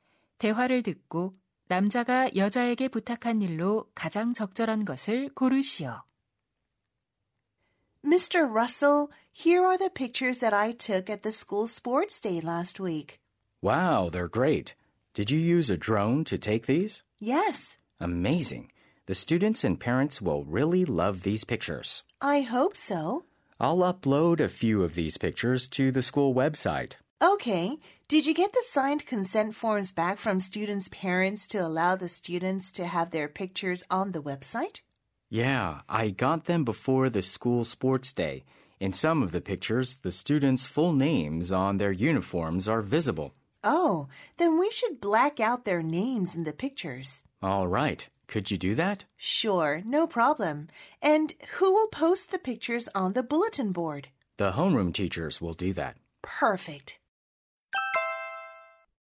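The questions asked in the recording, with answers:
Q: 대화를 듣고 남자가 여자에게 부탁한 일로 가장 적절한 것을 고르시오.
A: 사진 속 학생 이름 가리기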